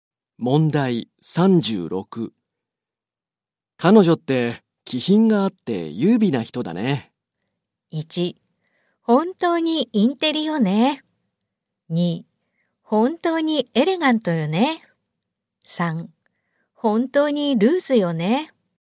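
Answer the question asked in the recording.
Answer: 2: 本当にエレガントよね。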